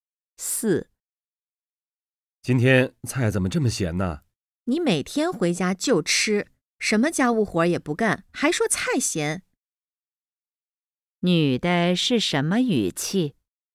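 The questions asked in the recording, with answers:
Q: 女的是什么语气?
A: 埋怨、不满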